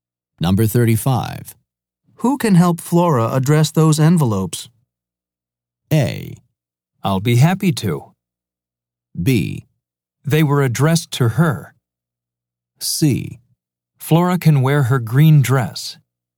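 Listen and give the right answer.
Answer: A: I'll be happy to.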